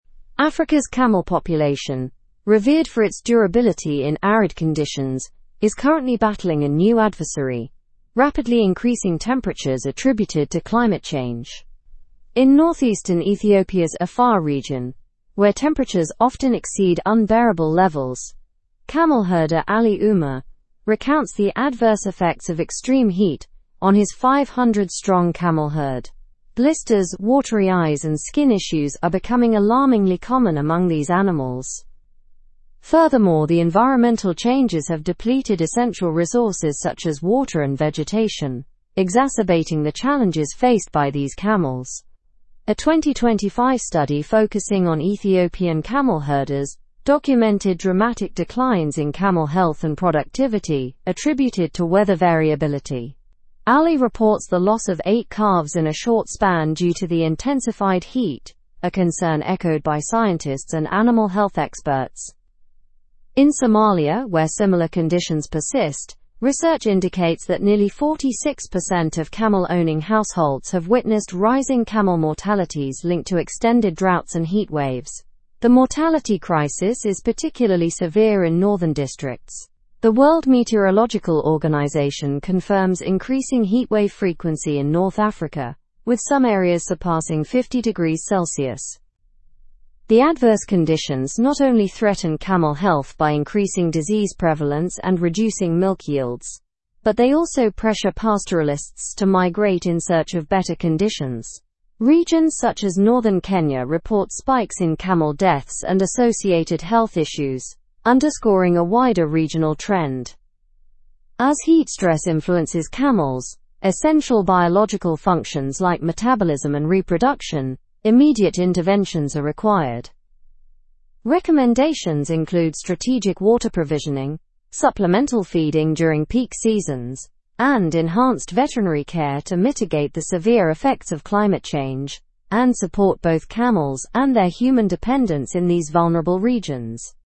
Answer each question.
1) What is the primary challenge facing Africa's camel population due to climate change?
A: The primary challenge is rapidly increasing temperatures.

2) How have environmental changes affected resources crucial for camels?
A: Environmental changes have depleted essential resources like water and vegetation.

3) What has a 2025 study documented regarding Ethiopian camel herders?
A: The study documented dramatic declines in camel health and productivity due to weather variability.

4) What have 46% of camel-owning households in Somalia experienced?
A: They have witnessed rising camel mortalities linked to extended droughts and heatwaves.

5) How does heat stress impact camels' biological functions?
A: Heat stress impacts metabolism and reproduction in camels.

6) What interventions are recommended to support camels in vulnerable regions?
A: Recommended interventions include strategic water provisioning, supplemental feeding, and enhanced veterinary care.

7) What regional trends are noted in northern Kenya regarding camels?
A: Northern Kenya reports spikes in camel deaths and associated health issues.

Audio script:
Africa's camel population, revered for its durability in arid conditions, is currently battling a new adversary: rapidly increasing temperatures attributed to climate change. In north-eastern Ethiopia's Afar region, where temperatures often exceed unbearable levels, camel herder Ali Umer recounts the adverse effects of extreme heat on his 500-strong camel herd. Blisters, watery eyes, and skin issues are becoming alarmingly common among these animals.
Furthermore, the environmental changes have depleted essential resources such as water and vegetation, exacerbating the challenges faced by these camels. A 2025 study focusing on Ethiopian camel herders documented dramatic declines in camel health and productivity attributed to weather variability. Ali reports the loss of eight calves in a short span due to the intensified heat, a concern echoed by scientists and animal health experts.
In Somalia, where similar conditions persist, research indicates that nearly 46% of camel-owning households have witnessed rising camel mortalities linked to extended droughts and heatwaves. The mortality crisis is particularly severe in northern districts. The World Meteorological Organization confirms increasing heatwave frequency in North Africa, with some areas surpassing 50°C.
The adverse conditions not only threaten camel health by increasing disease prevalence and reducing milk yields, but they also pressure pastoralists to migrate in search of better conditions. Regions such as northern Kenya report spikes in camel deaths and associated health issues, underscoring a wider regional trend.
As heat stress influences camels' essential biological functions like metabolism and reproduction, immediate interventions are required. Recommendations include strategic water provisioning, supplemental feeding during peak seasons, and enhanced veterinary care to mitigate the severe effects of climate change and support both camels and their human dependents in these vulnerable regions.
3. Debate the impact of climate change on animals in your region.
Show model answerEnvironmental changes have depleted essential resources like water and vegetation.
water provisioning, supplemental feeding during peak seasons, and enhanced veterinary care to mitigate the severe effects of climate change and support both camels and their human dependents in these vulnerable regions.

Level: Level 4